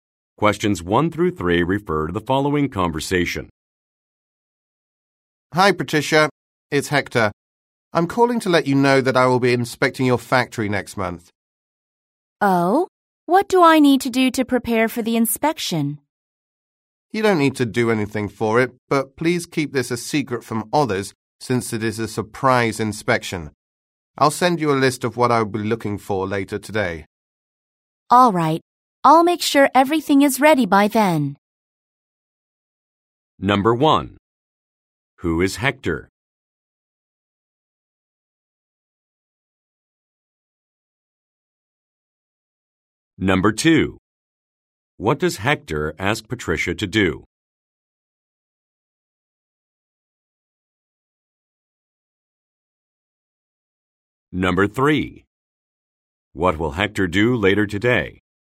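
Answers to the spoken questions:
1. A factory inspector
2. Keep the inspection a secret
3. Send a list of what he'll be looking for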